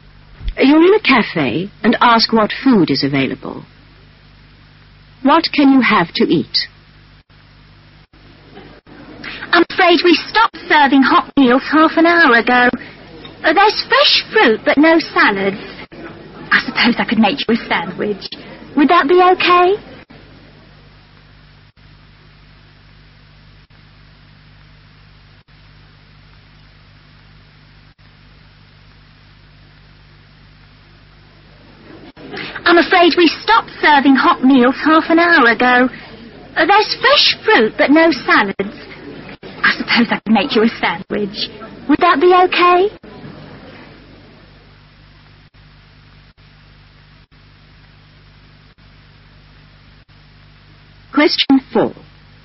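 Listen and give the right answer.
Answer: Fresh fruit or a sandwich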